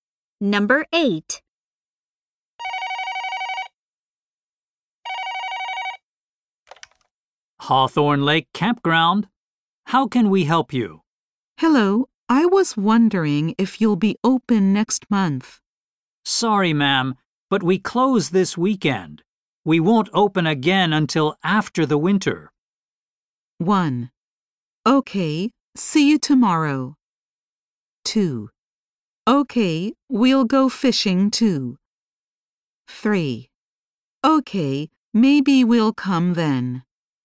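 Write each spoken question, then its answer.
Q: We won't open again until after the winter.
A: 3: Okay, maybe we'll come then.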